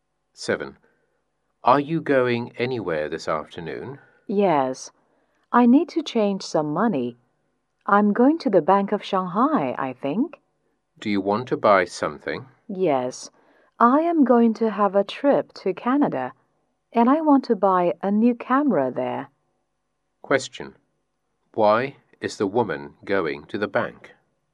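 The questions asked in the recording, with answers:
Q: Why is the woman going to the bank?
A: To change some money for her trip to Canada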